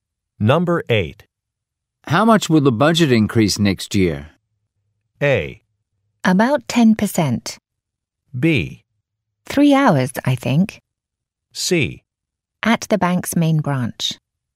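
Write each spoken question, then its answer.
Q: How much will the budget increase next year?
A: A: About 10%.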